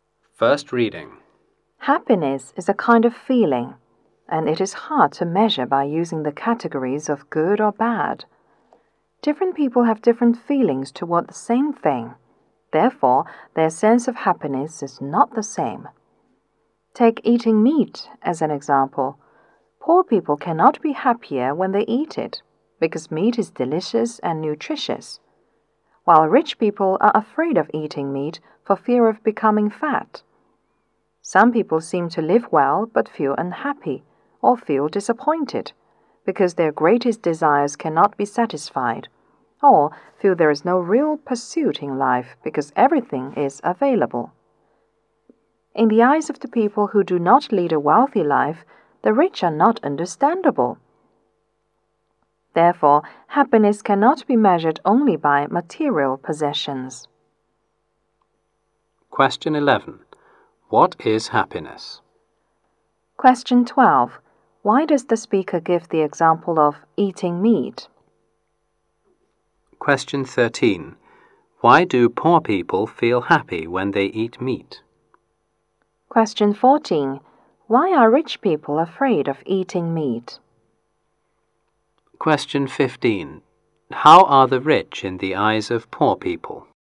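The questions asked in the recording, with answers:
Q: What is happiness?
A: A kind of feeling

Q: Why does the speaker give the example of eating meat?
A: To show people feel differently about the same thing

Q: Why do poor people feel happy when they eat meat?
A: Meat is delicious and nutritious

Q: Why are rich people afraid of eating meat?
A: For fear of becoming fat

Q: How are the rich in the eyes of poor people?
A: Not understandable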